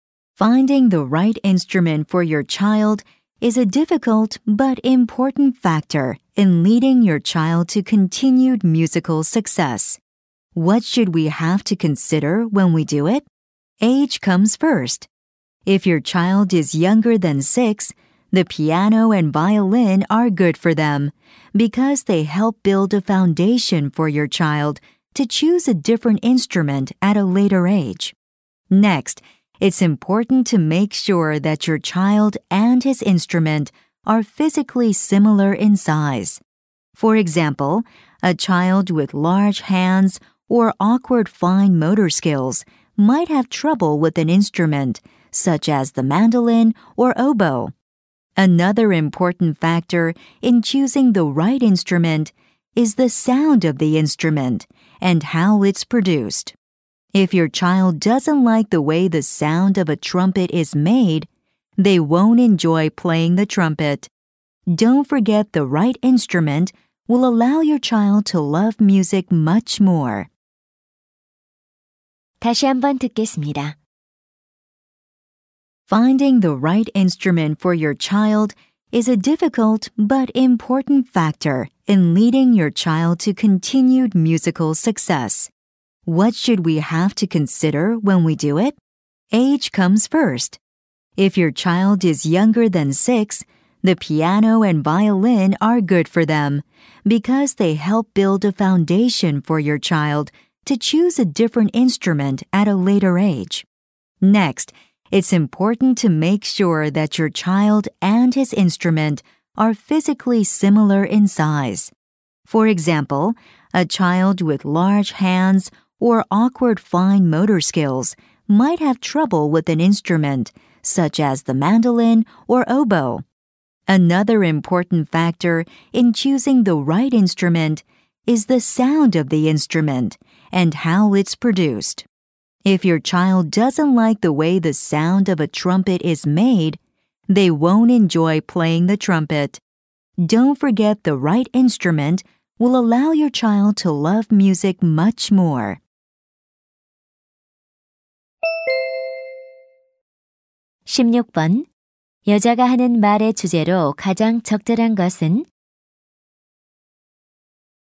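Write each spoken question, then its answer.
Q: 여자가 하는 말의 주제로 가장 적절한 것은?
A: 아이에게 맞는 악기를 고르는 방법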